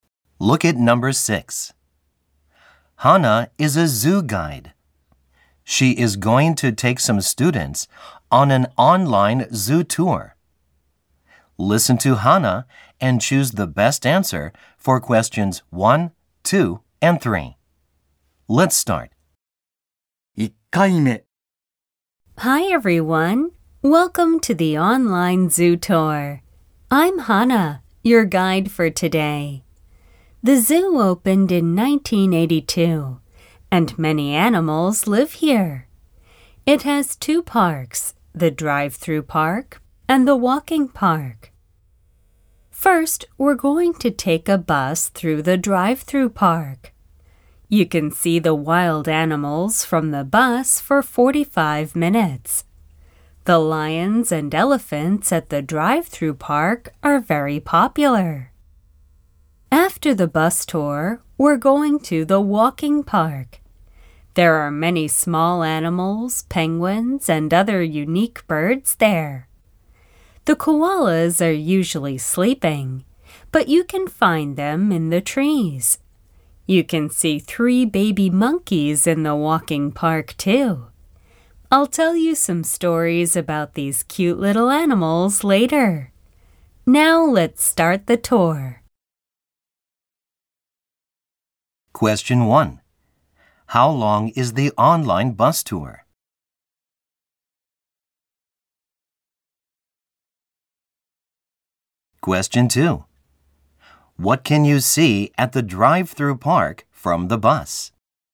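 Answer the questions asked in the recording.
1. 45 minutes
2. Wild animals such as lions and elephants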